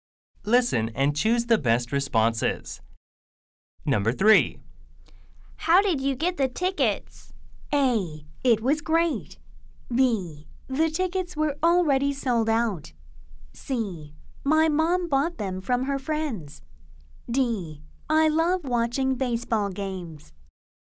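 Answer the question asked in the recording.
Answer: C: My mom bought them from her friends.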